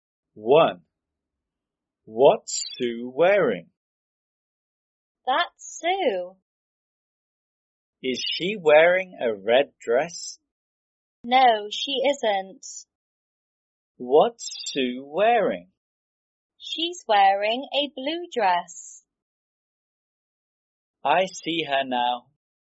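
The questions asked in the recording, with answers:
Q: What's Sue wearing?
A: A blue dress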